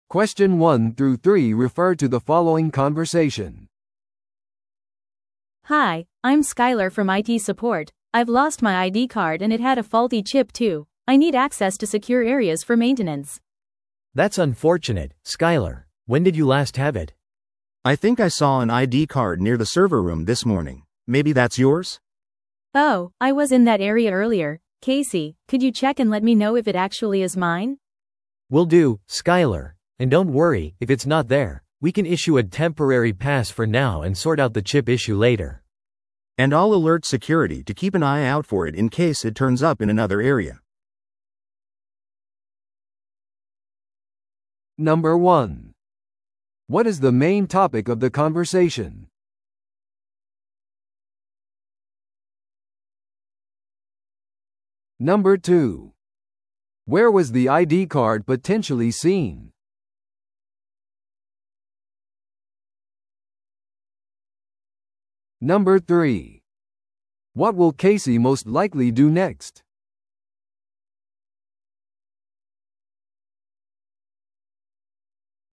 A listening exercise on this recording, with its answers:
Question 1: What is the main topic of the conversation?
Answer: 紛失および不良のIDカードについての対策。

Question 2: Where was the ID card potentially seen?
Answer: サーバールームの近く。

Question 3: What will Casey most likely do next?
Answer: サーバールームの近くでIDカードを探す。

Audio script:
I've lost my ID card and it had a faulty chip too. I need access to secure areas for maintenance.
B: That's unfortunate, Skyler. When did you last have it?
C: I think I saw an ID card near the server room this morning. Maybe that's yours?
A: Oh, I was in that area earlier! Casey, could you check and let me know if it actually is mine?
B: Will do, Skyler. And don't worry, if it's not there, we can issue a temporary pass for now and sort out the chip issue later.
C: And I'll alert security to keep an eye out for it in case it turns up in another area.